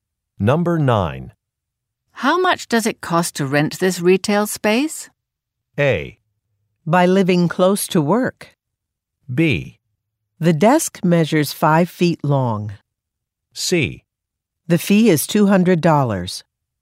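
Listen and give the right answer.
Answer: C: The fee is $200.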